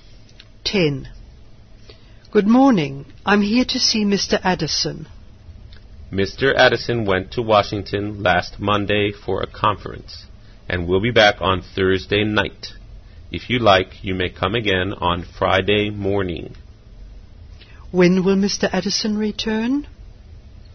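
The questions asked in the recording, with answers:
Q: When will Mr. Addison return?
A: On Thursday night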